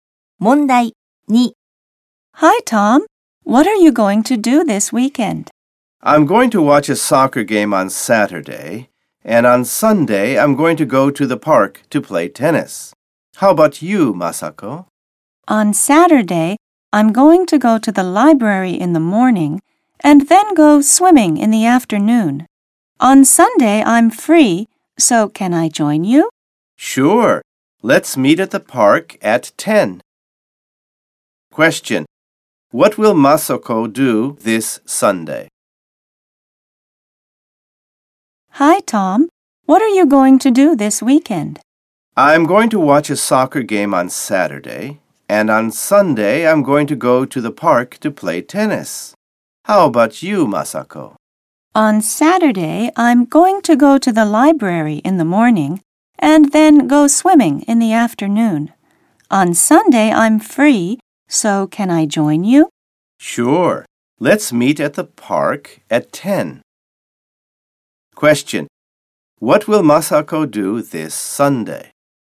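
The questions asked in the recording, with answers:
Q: What will Masako do this Sunday?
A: Play tennis with Tom in the park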